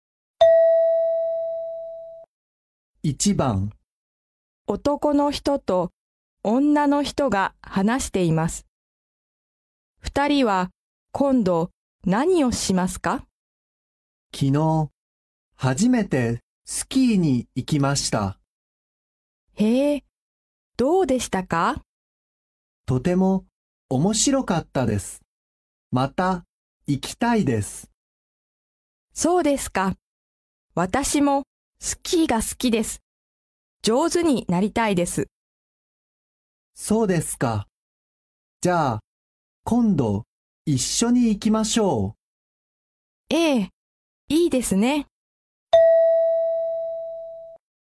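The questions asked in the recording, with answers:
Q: 二人は今度何をしますか?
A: 一緒にスキーに行く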